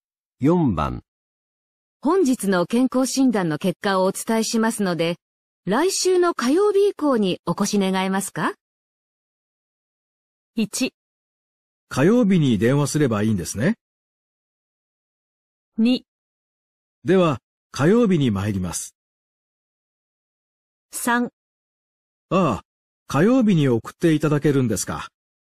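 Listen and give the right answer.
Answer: 2: では、火曜日に参ります。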